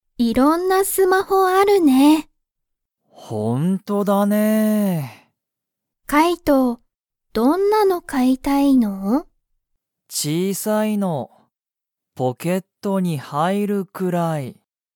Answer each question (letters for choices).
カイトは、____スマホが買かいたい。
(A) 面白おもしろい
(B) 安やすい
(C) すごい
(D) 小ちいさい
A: D

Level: Level 1